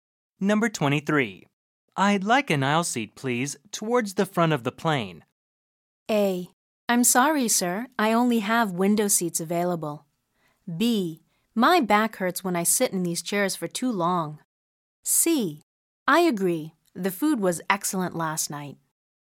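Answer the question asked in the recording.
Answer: A: I'm sorry, sir. I only have window seats available.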